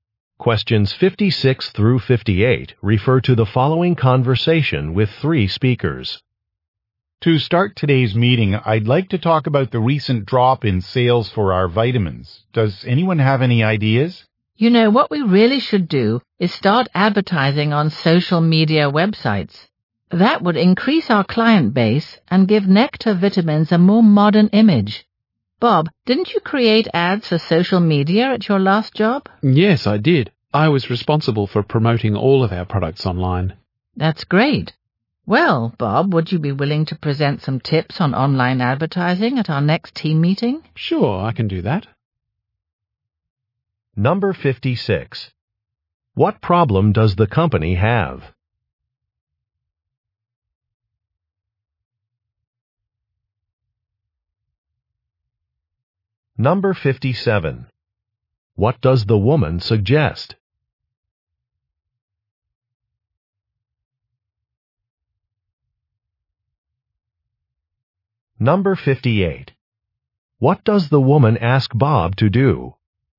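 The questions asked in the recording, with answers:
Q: What problem does the company have?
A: Sales of its vitamins have dropped

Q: What does the woman suggest?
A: Advertising on social media

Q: What does the woman ask Bob to do?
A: Present tips on online advertising at the next meeting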